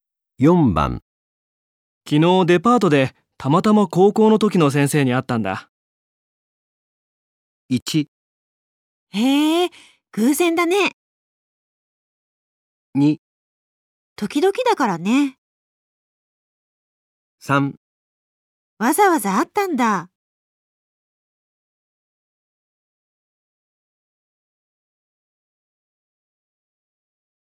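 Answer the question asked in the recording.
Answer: 1: へえ、偶然だね。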